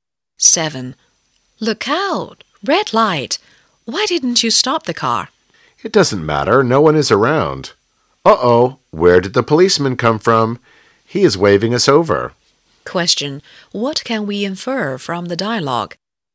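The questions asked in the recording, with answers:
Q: What can we infer from the dialogue?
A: The driver ran a red light and is being stopped by a policeman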